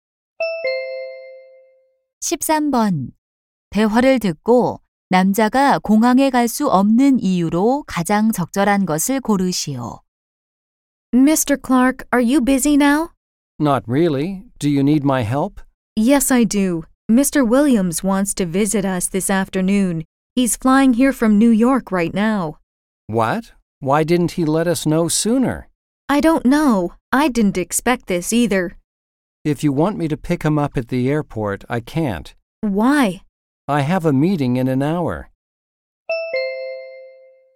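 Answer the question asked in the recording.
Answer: 한 시간 후에 회의가 있어서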